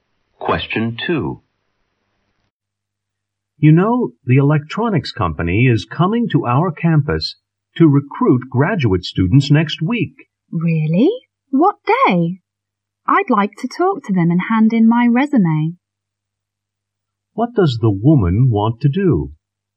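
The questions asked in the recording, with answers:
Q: What does the woman want to do?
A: Talk to the company's recruiters and hand in her resume.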